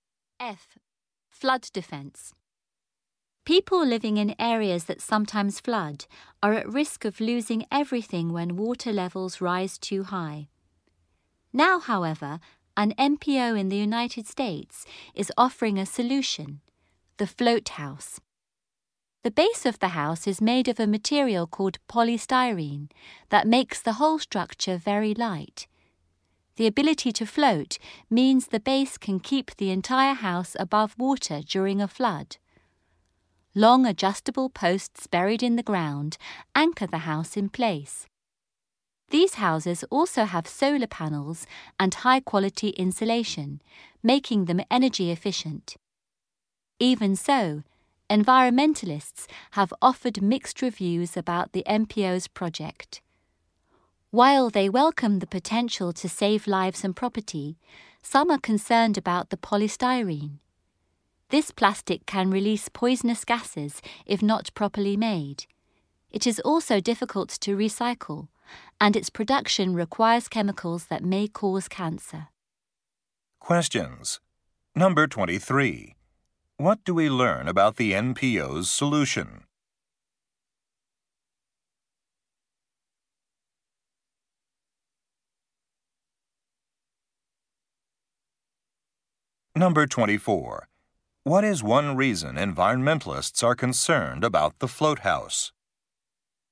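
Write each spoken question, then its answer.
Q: What do we learn about the NPO's solution?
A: The house floats above the water during a flood.

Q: What is one reason environmentalists are concerned about the float house?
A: Polystyrene can release poisonous gases and is hard to recycle.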